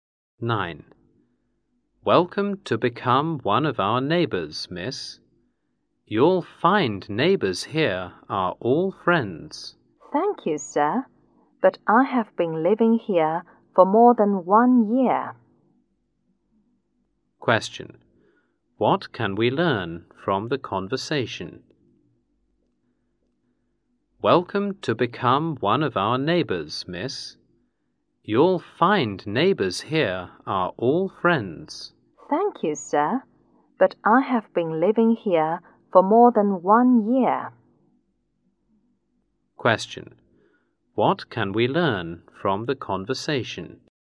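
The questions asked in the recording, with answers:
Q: What can we learn from the conversation?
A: The woman is not a new neighbor; she has lived there for over a year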